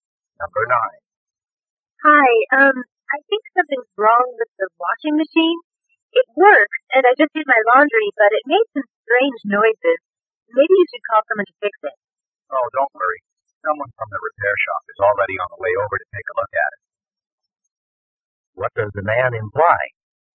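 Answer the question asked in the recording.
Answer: He has already called for someone to fix the machine.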